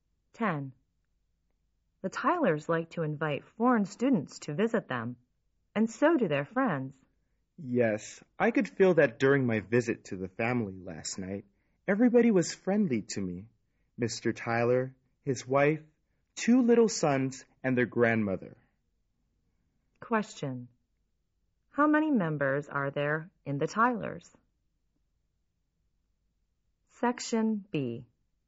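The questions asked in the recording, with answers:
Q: How many members are there in the Tylers?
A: Five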